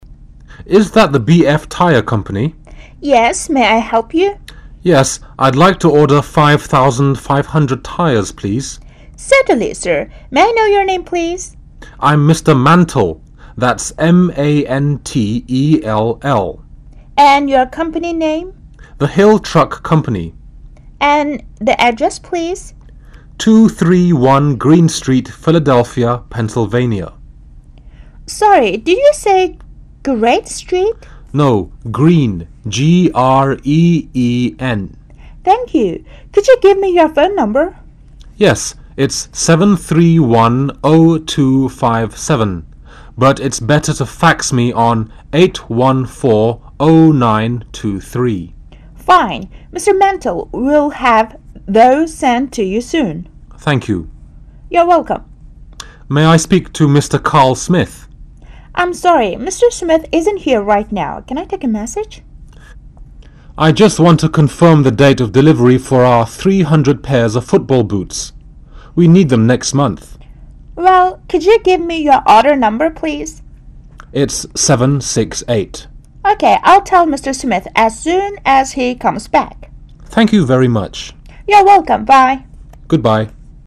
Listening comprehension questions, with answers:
For each question 16- 22, fill in the missing information in the numbered space using one or two words.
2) Company: The 2 company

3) Address: 3 street philadephia, Pennsylvania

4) Phone No: 4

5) Order details: 5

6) Message for: Mr. 6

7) Message: Confirm the date of delivery for order No. 768 7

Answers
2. Hill Truck
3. 231 Green
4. 7310257
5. tires
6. Carl Smith
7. football boots